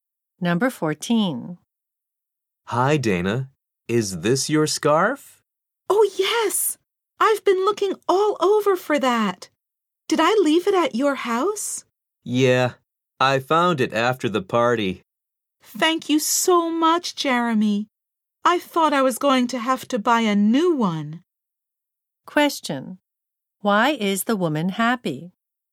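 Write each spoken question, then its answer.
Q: Why is the woman happy?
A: Jeremy found her lost scarf, so she doesn't need to buy a new one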